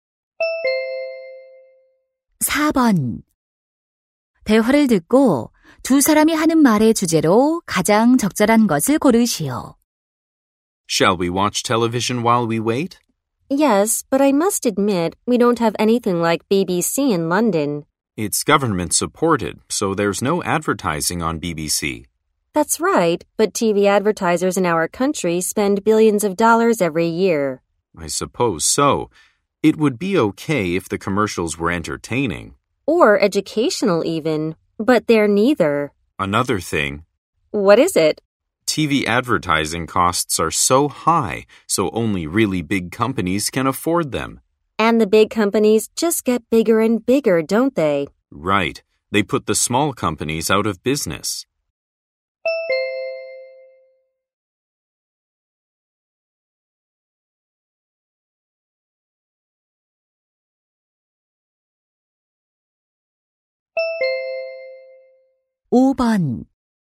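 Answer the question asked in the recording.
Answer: TV 광고의 문제점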